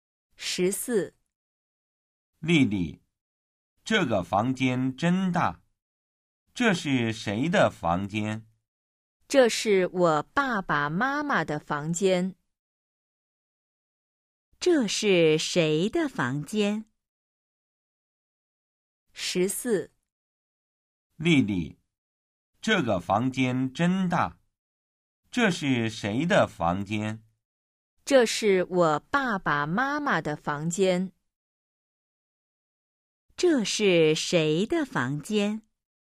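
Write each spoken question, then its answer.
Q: 这是谁的房间?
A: 她爸爸妈妈的房间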